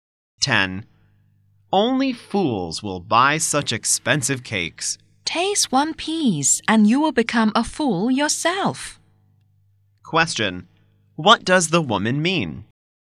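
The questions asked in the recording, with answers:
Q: Question. What does the woman mean?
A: The cakes are so good they are worth the price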